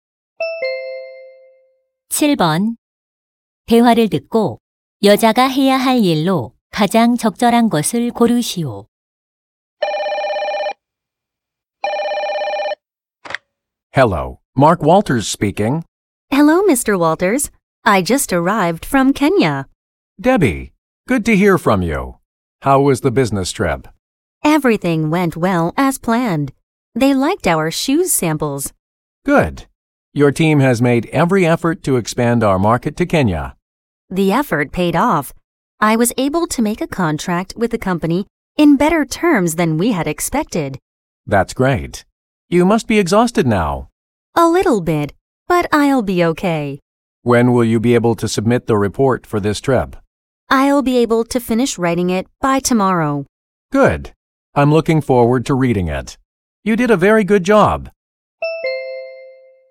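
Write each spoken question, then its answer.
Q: 대화를 듣고 여자가 해야 할 일로 가장 적절한 것을 고르시오.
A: 출장 보고서 작성하기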